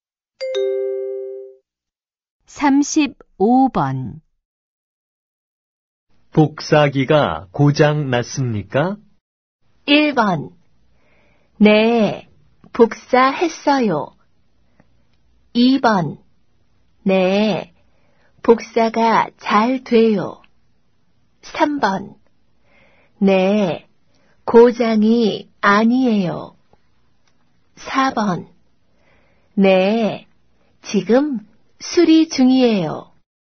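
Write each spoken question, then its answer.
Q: 복사기가 고장 났습니까?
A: 4: 네, 지금 수리 중이에요.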